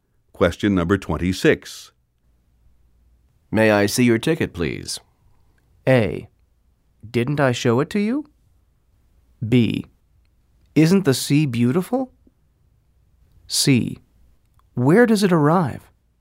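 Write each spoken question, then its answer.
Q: May I see your ticket, please?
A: A: Didn't I show it to you?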